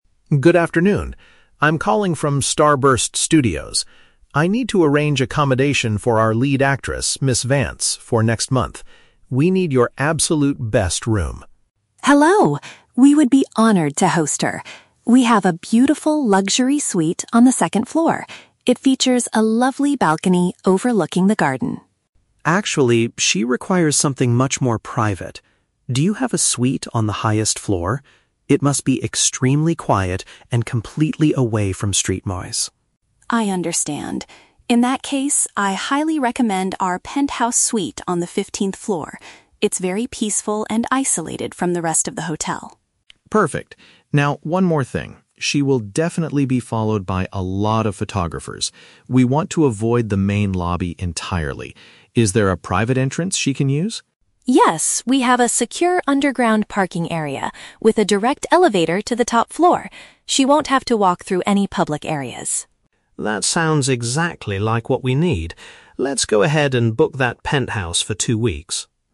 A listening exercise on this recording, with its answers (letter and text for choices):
Listen to a phone conversation between a production assistant and a hotel receptionist. Choose the correct answer (A, B, or C) for each question.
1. What is the main problem with the first room the receptionist suggests?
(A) It does not have a nice view of the hotel's garden.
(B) It is on a low level and lacks the necessary privacy.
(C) It is located right next to a very noisy and crowded street.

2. How will the actress reach her room without being seen by the media?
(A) She will use a special elevator from the basement parking lot.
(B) She will go through a hidden staff door in the main lobby.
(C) She will be escorted by a team of professional security guards.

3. What is the final outcome of the phone call?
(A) The assistant decides to find a different, quieter hotel for the actress.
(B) The assistant books the second-floor Luxury Suite for a two-week stay.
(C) The assistant reserves the Penthouse Suite because it meets all requirements.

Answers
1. (B) It is on a low level and lacks the necessary privacy.
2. (A) She will use a special elevator from the basement parking lot.
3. (C) The assistant reserves the Penthouse Suite because it meets all requirements.

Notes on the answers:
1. The receptionist offers a suite on the "second floor," but Leo rejects it because the actress needs something "much more private" on the "highest floor." Why the traps are wrong: (A) is a trap. The receptionist explicitly says the first room has a balcony "overlooking the garden." (C) is a trap. Leo says the new room must be away from street noise, but the first room faced the garden, not the street.
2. Sarah says there is a "secure underground parking area with a direct elevator to the top floor" (which paraphrases to using a special elevator from the basement parking lot). Why the traps are wrong: (B) is a trap. Leo specifically states they want to "avoid the main lobby entirely." (C) is a plausible celebrity treatment, but security guards are never mentioned in the audio.
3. At the end, Leo says, "Let's go ahead and book that Penthouse for two weeks." Why the traps are wrong: (A) is a trap. He is satisfied with the hotel's Penthouse and does not look for another hotel. (B) is a trap. The Luxury Suite is the first room that was mentioned and rejected.

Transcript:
Leo: Good afternoon, I'm calling from Starburst Studios. I need to arrange accommodation for our lead actress, Miss Vance, for next month. We need your absolute best room.
Sarah: Hello! We would be honored to host her. We have a beautiful Luxury Suite on the second floor. It features a lovely balcony overlooking the garden.
Leo: Actually, she requires something much more private. Do you have a suite on the highest floor? It must be extremely quiet and completely away from street noise.
Sarah: I understand. In that case, I highly recommend our Penthouse Suite on the fifteenth floor. It's very peaceful and isolated from the rest of the hotel.
Leo: Perfect. Now, one more thing. She will definitely be followed by a lot of photographers. We want to avoid the main lobby entirely. Is there a private entrance she can use?
Sarah: Yes, we have a secure underground parking area with a direct elevator to the top floor. She won't have to walk through any public areas.
Leo: That sounds exactly like what we need. Let's go ahead and book that Penthouse for two weeks.